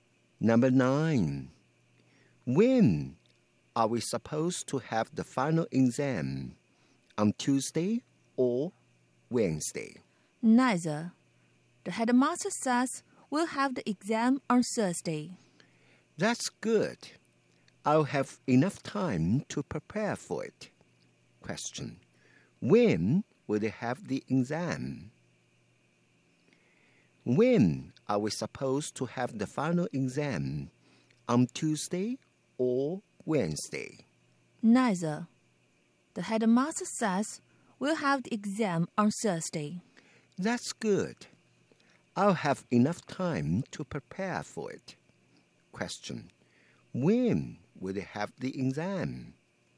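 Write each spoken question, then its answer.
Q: When will they have the exam?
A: On Thursday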